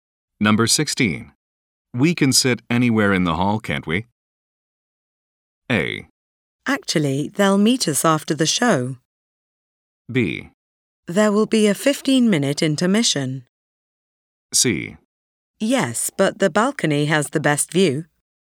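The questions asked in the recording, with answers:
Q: We can sit anywhere in the hall, can't we?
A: C: Yes, but the balcony has the best view.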